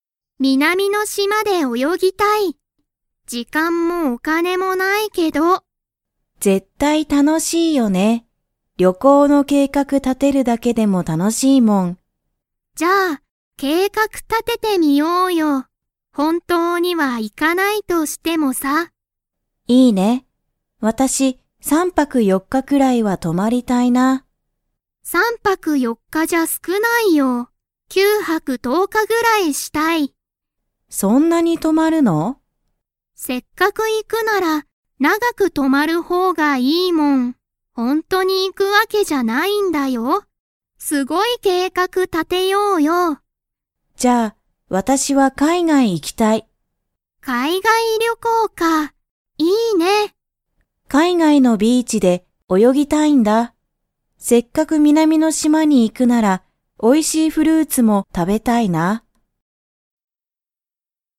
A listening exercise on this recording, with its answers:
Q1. 二人ふたりは、ほんとに旅行りょこうに 。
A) 行いく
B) 行いかない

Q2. 葵あおいさんは、南みなみの島しまで何なにを食たべたいですか?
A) 魚さかな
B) フルーツ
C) ケーキ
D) ステーキ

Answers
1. B
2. B

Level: Level 4

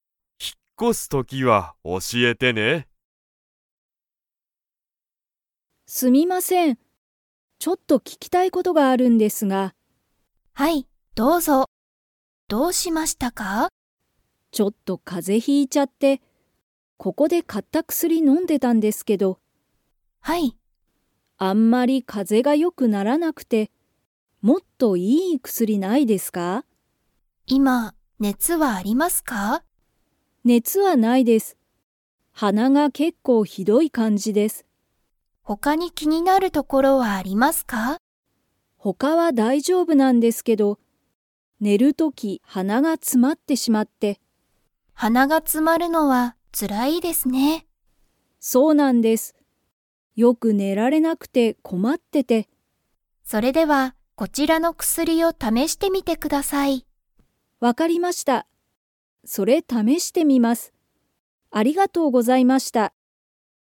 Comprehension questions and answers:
Comprehension Quiz (Skip if you don't understand the conversation yet)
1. 田中たなかさんは、 がほしい。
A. 風邪かぜ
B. ここで買かった薬くすり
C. もっといい薬くすり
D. ご飯はん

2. 田中たなかさんは、今いま、熱ねつはありますか?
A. はい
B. いいえ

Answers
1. C
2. B

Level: Level 4

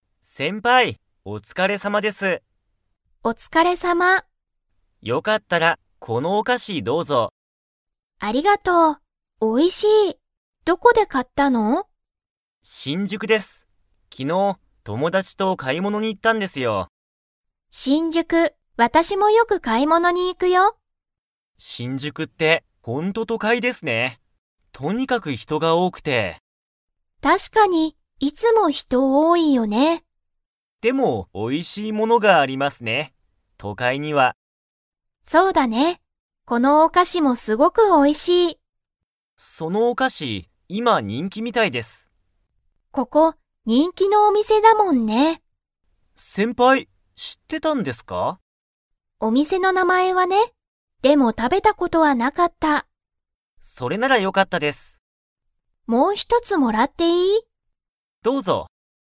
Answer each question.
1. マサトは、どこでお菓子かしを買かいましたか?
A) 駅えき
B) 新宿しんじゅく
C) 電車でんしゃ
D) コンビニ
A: B

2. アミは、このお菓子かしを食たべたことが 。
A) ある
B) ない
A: B

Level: Level 4

